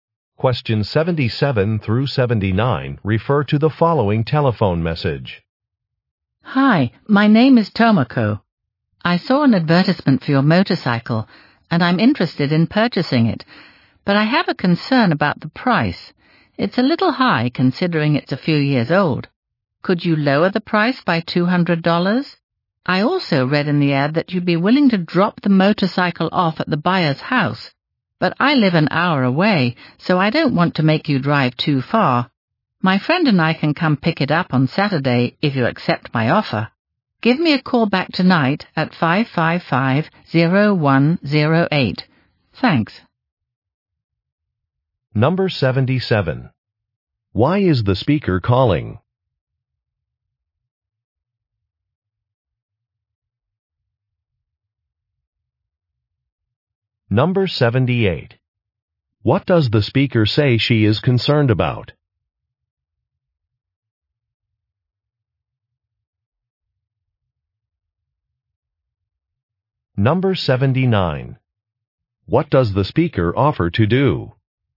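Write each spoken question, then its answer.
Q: Why is the speaker calling?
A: She wants to buy the motorcycle and asks for a lower price

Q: What does the speaker say she is concerned about?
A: The price

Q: What does the speaker offer to do?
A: Pick up the motorcycle herself on Saturday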